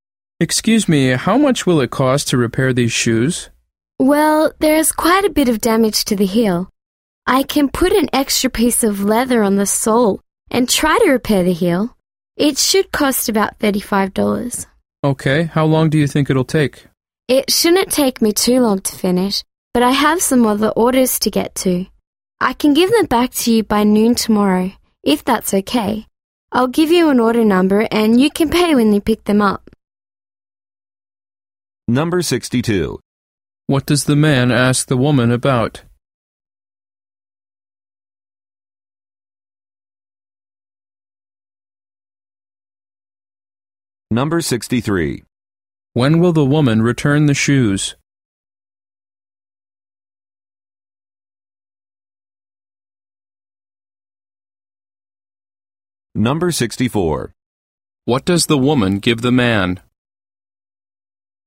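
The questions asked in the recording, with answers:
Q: What does the man ask the woman about?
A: The cost and time to repair his shoes

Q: When will the woman return the shoes?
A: By noon tomorrow

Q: What does the woman give the man?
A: An order number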